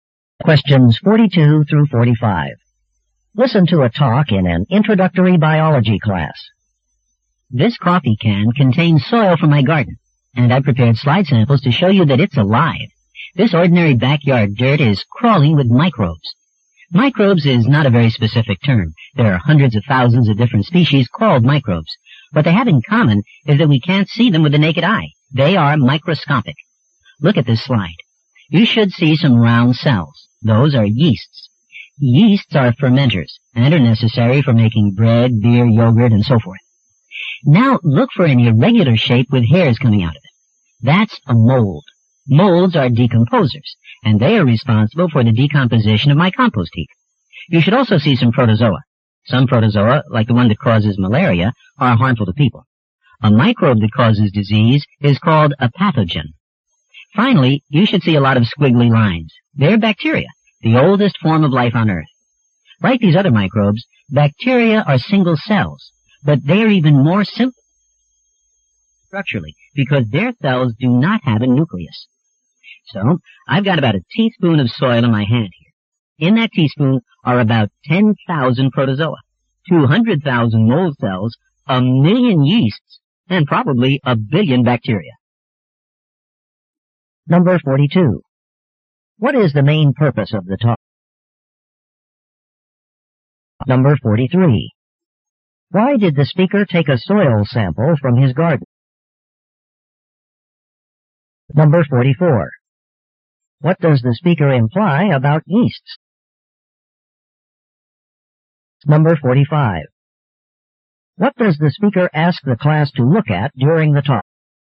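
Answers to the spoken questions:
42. To show that ordinary soil contains many kinds of microbes.
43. To show that it's alive with microbes.
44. They're useful, since they're needed to make bread, beer and yogurt.
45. Slides of soil samples.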